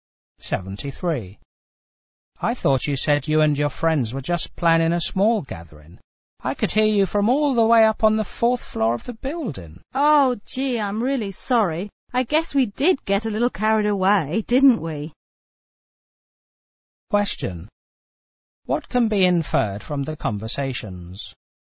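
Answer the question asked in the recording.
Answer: The party was noisier than planned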